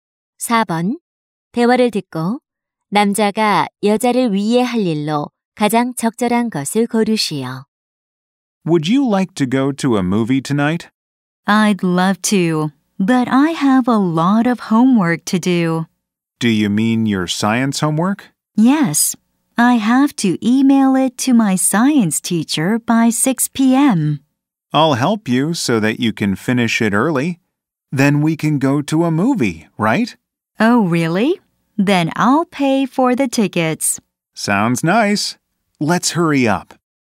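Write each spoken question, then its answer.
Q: 대화를 듣고 남자가 여자를 위해 할 일로 가장 적절한 것을 고르시오.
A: 과학 숙제 돕기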